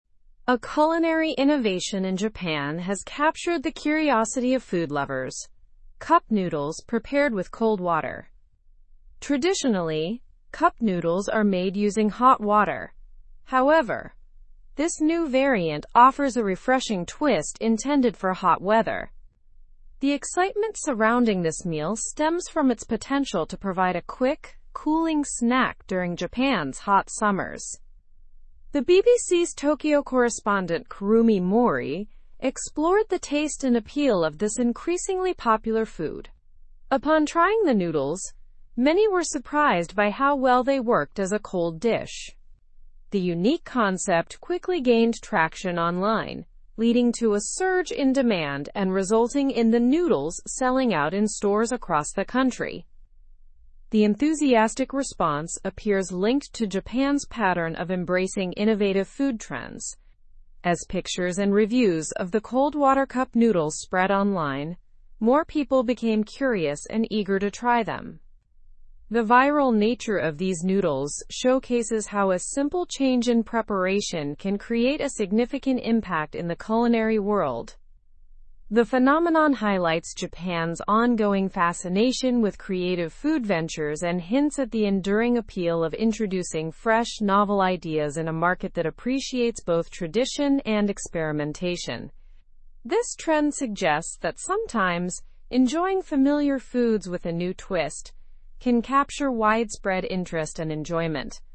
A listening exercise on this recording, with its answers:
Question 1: What is unique about the new cup noodles variant in Japan?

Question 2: Why is the cold water version of noodles seen as refreshing?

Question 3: Who explored the taste and popularity of the cold water cup noodles?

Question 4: What happened after the concept gained traction online?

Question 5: How does Japan's approach to food trends contribute to the noodles' popularity?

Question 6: What was the public's reaction to the cold water cup noodles?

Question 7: What does the popularity of cold water cup noodles suggest about food trends?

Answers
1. The new cup noodles variant in Japan is prepared using cold water instead of hot water.
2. It is seen as refreshing because it provides a cooling snack option suitable for hot weather.
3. The BBC's Tokyo correspondent, Kurumi Mori, explored the taste and popularity of these noodles.
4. After gaining traction online, the noodles sold out in stores across Japan.
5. Japan's openness to innovative food trends contributed to the curiosity and eagerness to try the noodles.
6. The public was surprised by how well they worked as a cold dish.
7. It suggests that changes in preparation can capture widespread interest and enjoyment in the culinary world.

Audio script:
A culinary innovation in Japan has captured the curiosity of food lovers: cup noodles prepared with cold water. Traditionally, cup noodles are made using hot water; however, this new variant offers a refreshing twist intended for hot weather. The excitement surrounding this meal stems from its potential to provide a quick, cooling snack during Japan's hot summers.
The BBC's Tokyo correspondent, Kurumi Mori, explored the taste and appeal of this increasingly popular food. Upon trying the noodles, many were surprised by how well they worked as a cold dish. The unique concept quickly gained traction online, leading to a surge in demand and resulting in the noodles selling out in stores across the country.
The enthusiastic response appears linked to Japan's pattern of embracing innovative food trends. As pictures and reviews of the cold water cup noodles spread online, more people became curious and eager to try them. The viral nature of these noodles showcases how a simple change in preparation can create a significant impact in the culinary world.
The phenomenon highlights Japan's ongoing fascination with creative food ventures and hints at the enduring appeal of introducing fresh, novel ideas in a market that appreciates both tradition and experimentation. This trend suggests that sometimes, enjoying familiar foods with a new twist can capture widespread interest and enjoyment.

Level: Level 3